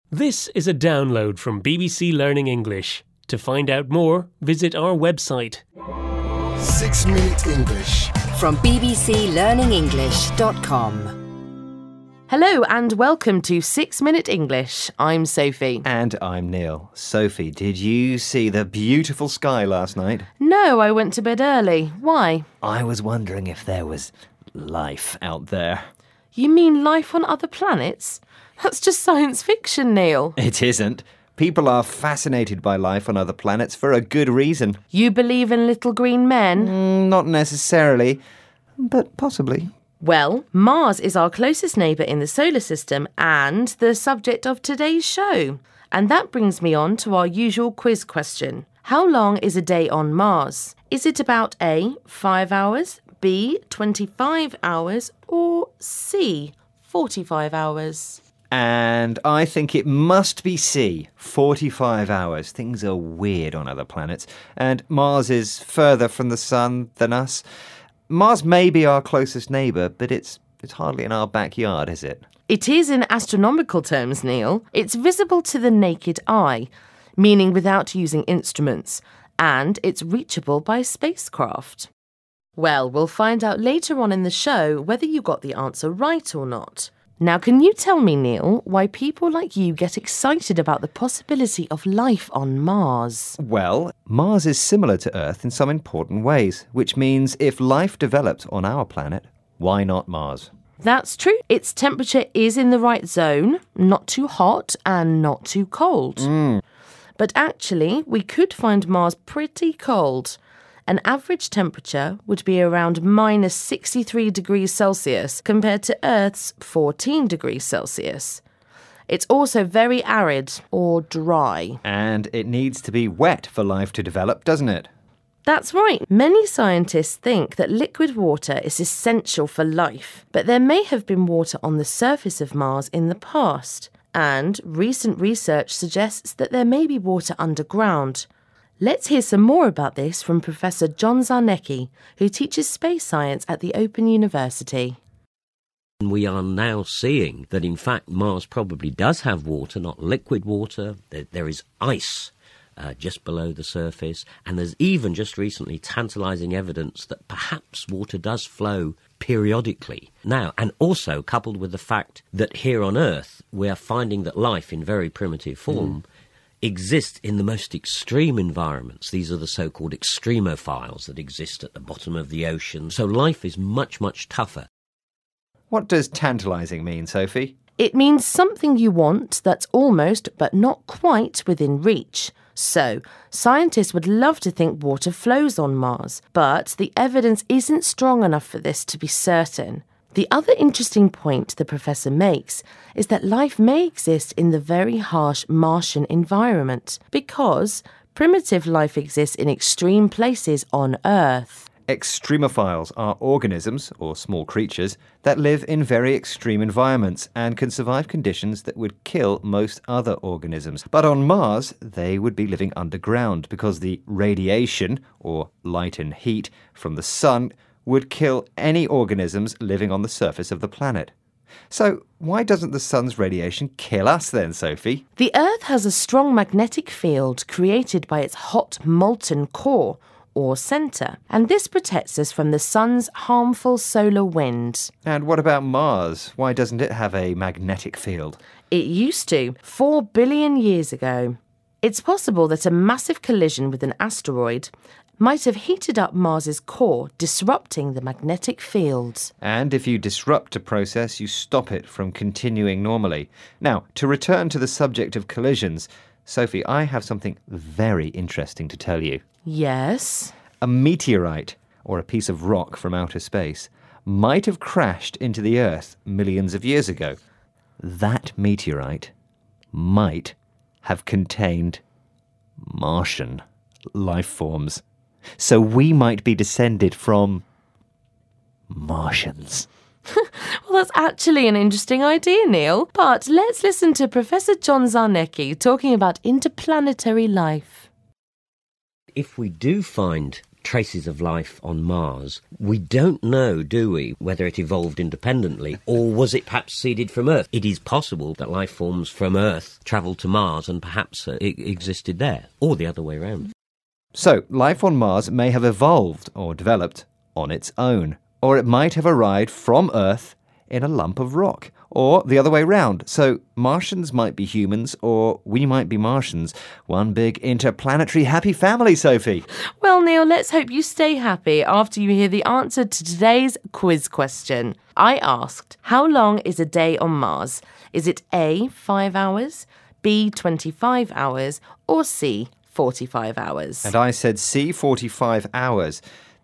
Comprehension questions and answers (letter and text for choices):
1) How long is a day on Mars?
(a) 5 hours?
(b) 25 hours?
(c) 45 hours?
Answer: (b) 25 hours?

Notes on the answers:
火星上的一天只比地球长一点,是25小时一天。

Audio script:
And I'm Neil. Sophie – did you see the beautiful sky last night?
No, I went to bed early. Why?
I was wondering if there was life out there.
You mean life on other planets?That's just science fiction, Neil.
It isn't! People are fascinated by life on other planets for a good reason.
You believe in little green men?
Not necessarily... but possibly.
Well, Mars is our closest neighbour in the solar system and the subject of today's show. And that brings me on to our usual quiz question.How long is a day on Mars?Is it about...a) 5 hours?b) 25 hours?Or c) 45 hours?
And I think it must be c) 45 hours.Things are weird on other planets. And Mars is further from the sun than us... Mars may be our closest neighbour, but it's hardly in our backyard, is it?
It is in astronomical terms, Neil – it's visible to the naked eye – meaning without using instruments – and it's reachable by spacecraft. Well, we'll find out later on in the show whether you got the answer right or not.Now can you tell me Neil why people like you get excited about the possibility of life on Mars?
Well, Mars is similar to the Earth in some important ways which means if life developed on our planet, why not Mars?
That's true.Its temperature is in the right zone – not too hot and not too cold.But actually we could find Mars pretty cold– an average temperature would be around minus 63 degrees Celsius compared to Earth's 14 degrees Celsius.It's also very arid – or dry.
And it needs to be wet for life to develop, doesn't it?
That's right. Many scientists think that liquid water is essential for life!But there may have been water on the surface of Mars in the past.And recent research suggests that there may be water underground.Let's hear some more about this from Professor John Zarnecki, who teaches Space Science at The Open University.
We are now seeing that in fact Mars probably does have water – not liquid water – that there is ice just below the surface and there's even just recently tantalizing evidence that perhaps water does flow periodically... Now, and also coupled with the factthat here on Earth we're finding that life in very primitive form exists in the most extreme environments,these are the so called 'extremophiles' that exist at the bottom of the oceans... So life is much, much tougher.
What does tantalizing mean, Sophie?
It means something you want that's almost, but not quite, within reach.So, scientists would love to think water flows on Mars but the evidence isn't strong enough for this to be certain.The other interesting point the professor makes is that life may exist in the very harsh Martian environment – because primitive life exists in extreme places on Earth.
Extremophiles are organisms – or small creatures – that live in very extreme environmentsand can survive conditions that would kill most other organisms.But on Mars they would be living underground because the radiation – or light and heat – from the Sun would kill any organisms living on the surface of the planet.So why doesn't the Sun's radiation kill us then, Sophie?
The Earth has a strong magnetic field created by its hot molten core – or centre– and this protects us from the Sun's harmful solar winds.
And what about Mars - why doesn't it have a magnetic field?
It used to – 4 billion years ago. It's possible that a massive collision with an asteroid might have heated up Mars's core, disrupting the magnetic fields.
And if you disrupt a process you stop it from continuing normally.Now, to return to the subject of collisions, Sophie, I have something very interesting to tell you.
Yes?
A meteorite – or a piece of rock from outer space – might've crashed into the Earth millions of years ago.That meteorite might have contained Martian life forms.So we might be descended from Martians!
That's actually an interesting idea, Neil.But let's listen to Professor John Zarnecki talking about interplanetary life.
If we do find traces of life on Mars we don't know, do we - whether it evolved independently or was it perhaps seeded from Earth.It is possible that life forms from Earth travelled to Mars and perhaps existed there – or the other way round.
So life on Mars may have evolved – or developed – on its own.Or it might have arrived from Earth in a lump of rock...Or the other way round! So Martians might be humans or we might be Martians!One big interplanetary happy family, Sophie!